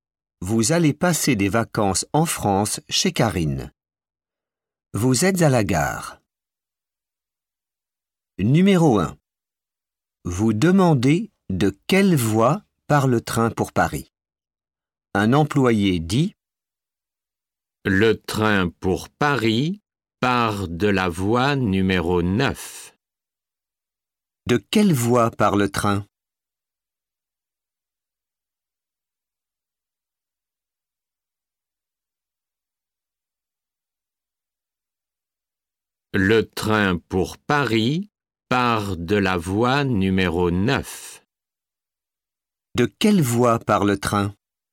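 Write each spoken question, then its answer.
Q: De quelle voie part le train ?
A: Voie numéro 9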